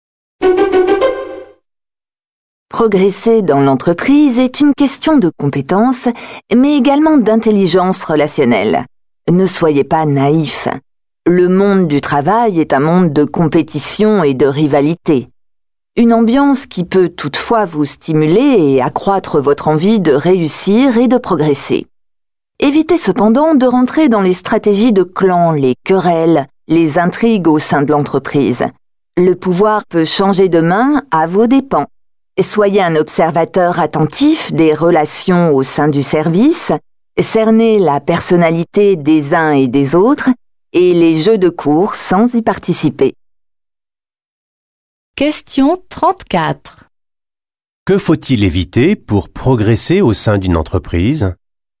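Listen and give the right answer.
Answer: Les stratégies de clan, querelles et intrigues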